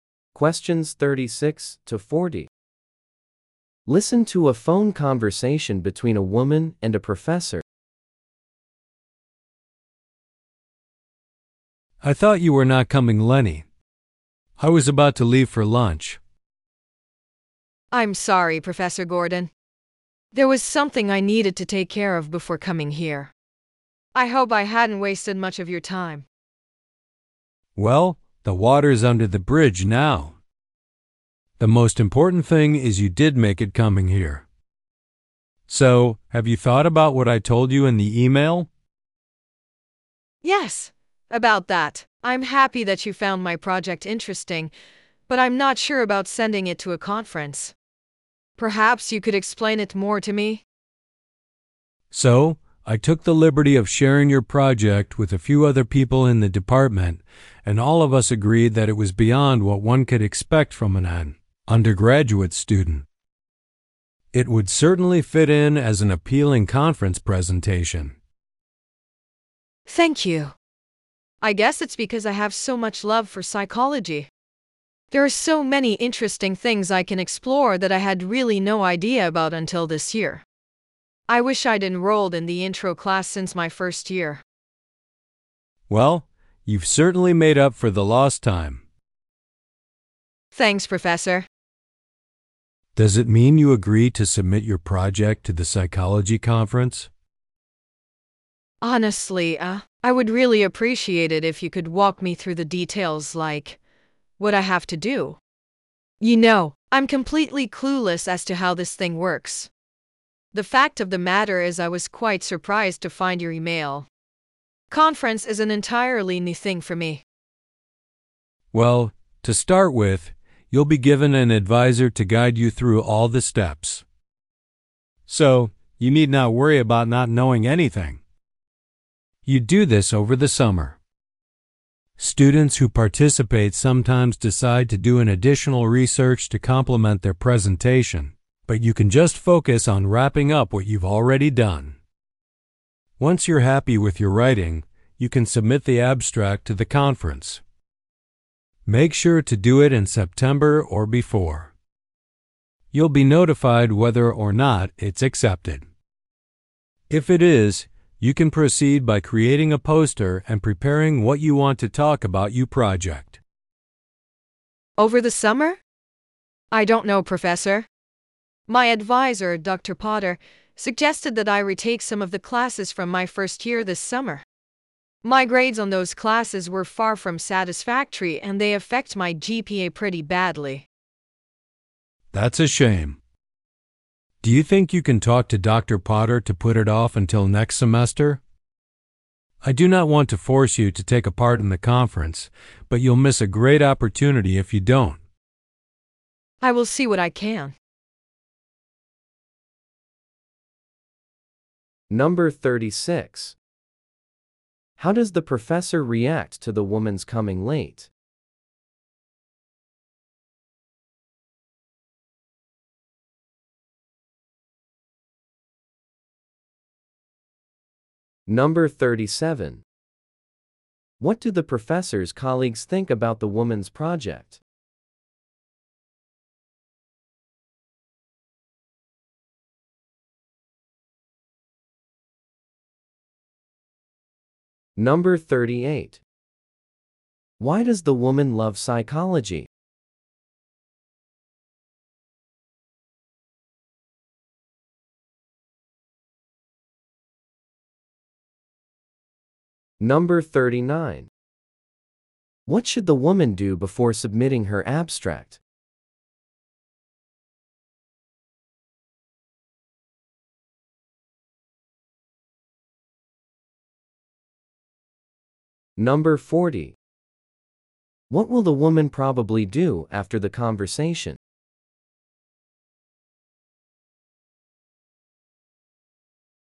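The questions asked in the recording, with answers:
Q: How does the professor react to the woman's coming late?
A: She lets it go; what matters is that the woman came

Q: What do the professor's colleagues think about the woman's project?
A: It goes beyond what anyone would expect from an undergraduate

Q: Why does the woman love psychology?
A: There are so many interesting things to explore

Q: What should the woman do before submitting her abstract?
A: Finish the writing for the project she has already done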